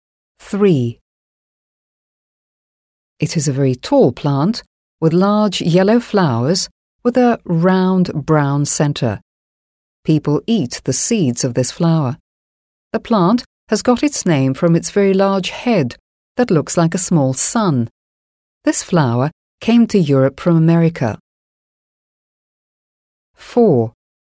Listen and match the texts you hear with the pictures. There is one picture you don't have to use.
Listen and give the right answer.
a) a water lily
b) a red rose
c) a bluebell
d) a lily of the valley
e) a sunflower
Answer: e) a sunflower

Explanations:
Слова «looks like a small sun» (похожа на маленькое солнце) и «eat the seeds» (едят семена) безошибочно указывают на sunflower (подсолнух). Само слово sunflower состоит из двух корней: sun (солнце) + flower (цветок).

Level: 7 класс